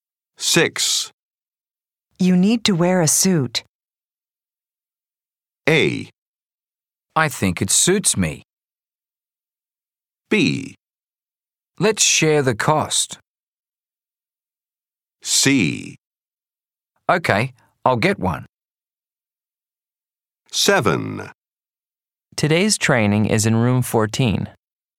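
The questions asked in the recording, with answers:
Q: You need to wear a suit.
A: C: Okay, I'll get one.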